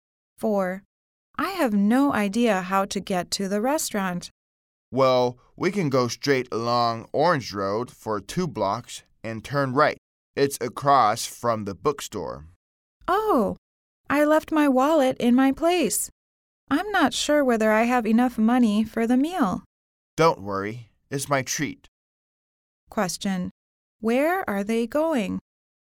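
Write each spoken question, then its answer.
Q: Where are they going?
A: To the restaurant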